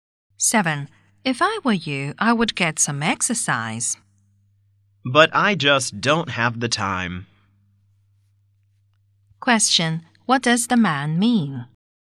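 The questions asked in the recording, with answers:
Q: What does the man mean?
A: He has no time for exercise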